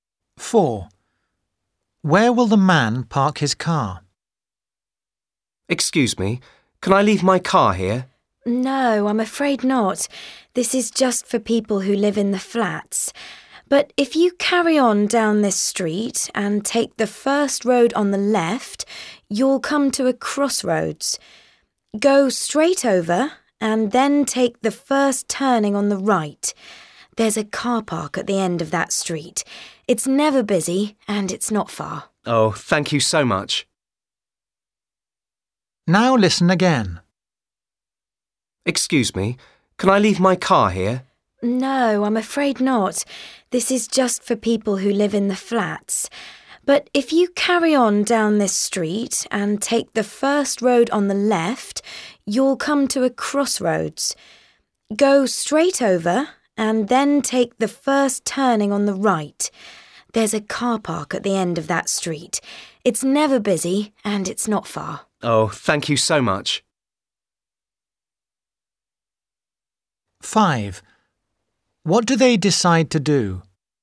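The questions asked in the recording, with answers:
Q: Where will the man park his car?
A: in the car park at the end of the street, after the crossroads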